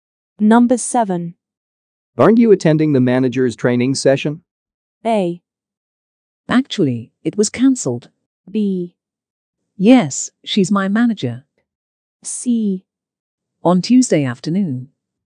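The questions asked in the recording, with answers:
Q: Aren't you attending the manager's training session?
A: A: Actually, it was cancelled.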